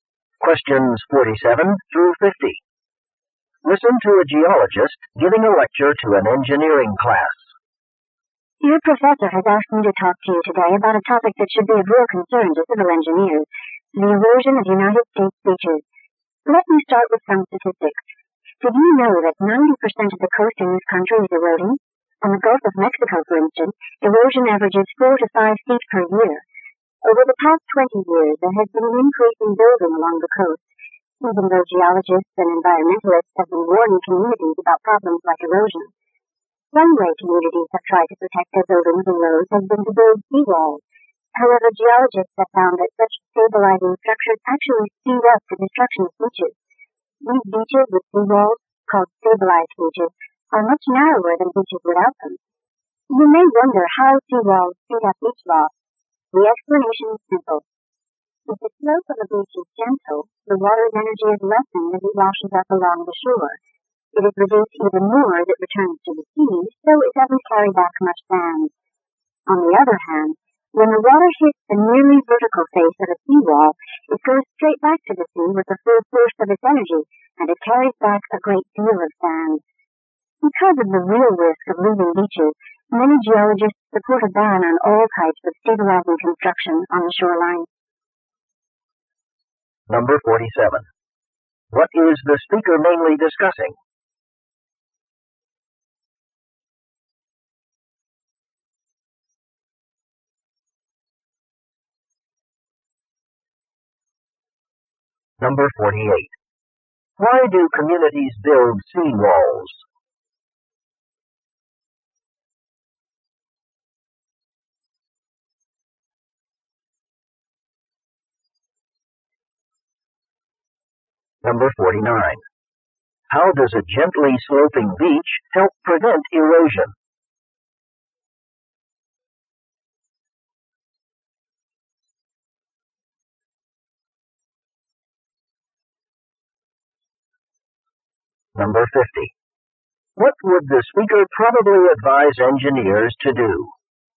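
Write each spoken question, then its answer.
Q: What is the speaker mainly discussing?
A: Beach erosion and how seawalls speed it up.

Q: Why do communities build seawalls?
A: To protect buildings and roads.

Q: How does a gently sloping beach help prevent erosion?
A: It reduces the water's energy, so less sand is carried back to the sea.

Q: What would the speaker probably advise engineers to do?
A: Avoid building stabilizing structures on the shoreline.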